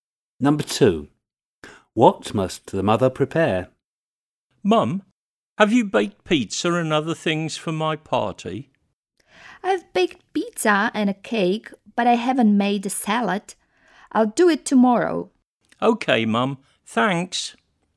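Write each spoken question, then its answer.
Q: What must the mother prepare?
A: a salad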